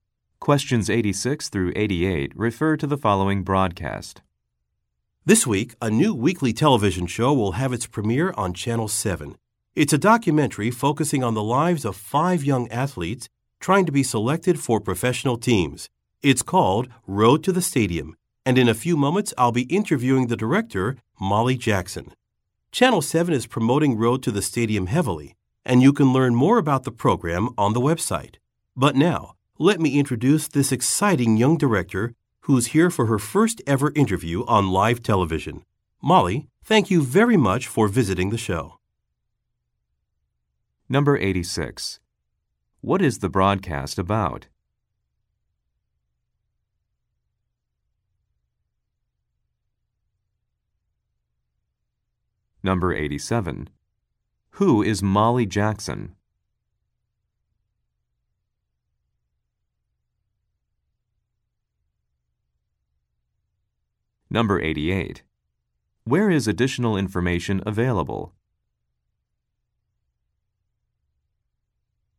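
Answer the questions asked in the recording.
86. A new TV documentary show
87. The director of the show
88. On the website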